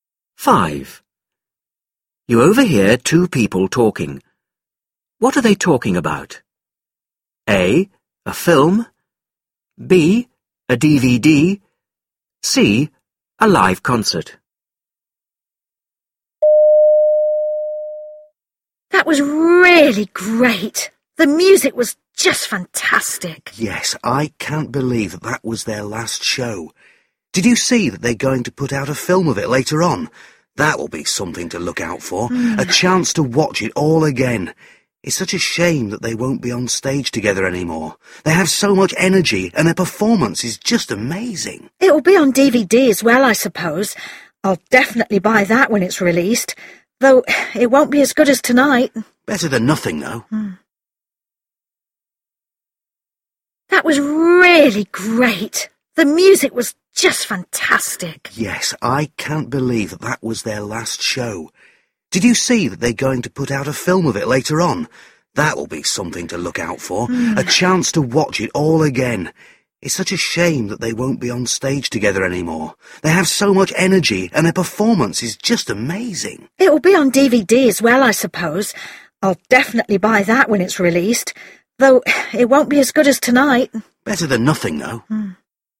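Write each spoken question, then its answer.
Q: What are they talking about?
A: C: A live concert.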